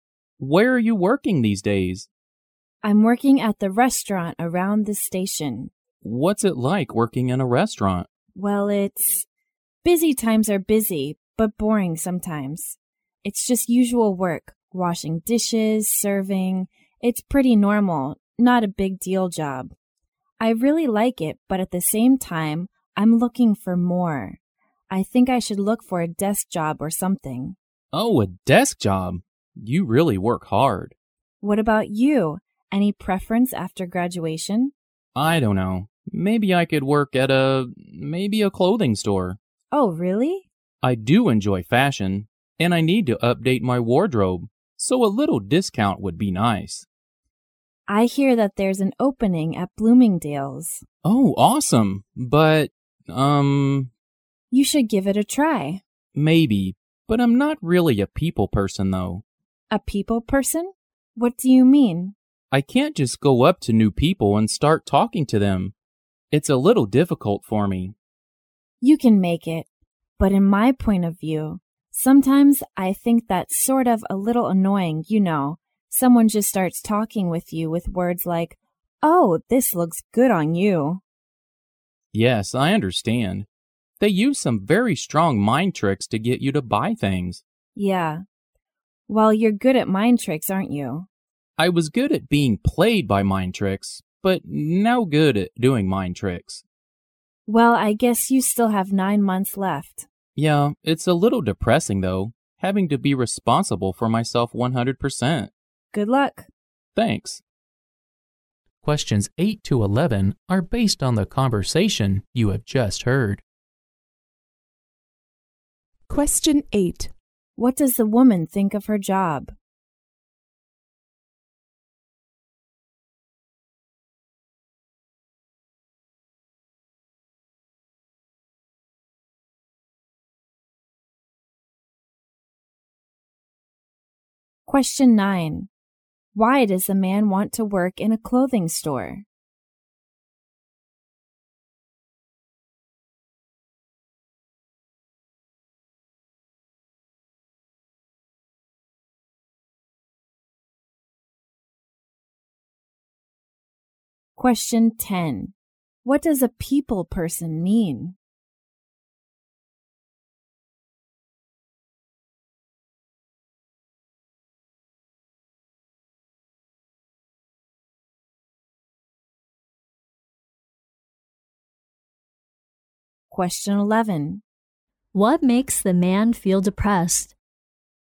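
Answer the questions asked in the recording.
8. It's busy sometimes but boring sometimes; normal work
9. He enjoys fashion and would like a discount
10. Someone who can easily go up to new people and talk to them
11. Having to be 100% responsible for himself after graduation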